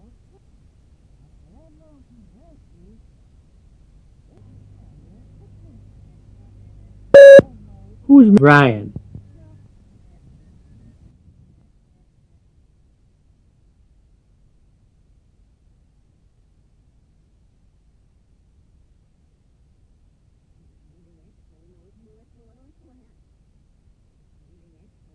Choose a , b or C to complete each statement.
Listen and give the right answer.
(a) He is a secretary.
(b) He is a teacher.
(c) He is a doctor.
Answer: (b) He is a teacher.